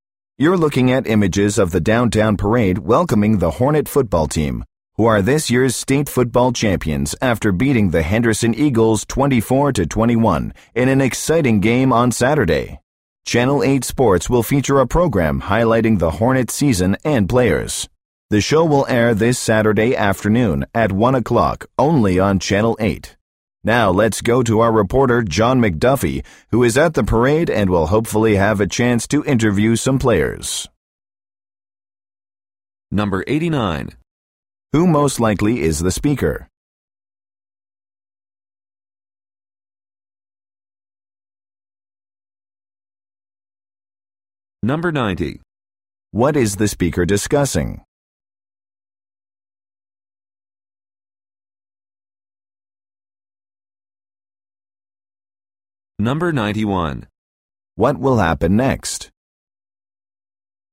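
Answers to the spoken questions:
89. A TV news broadcaster
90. A parade welcoming the state champion Hornet football team
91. A reporter at the parade will interview some players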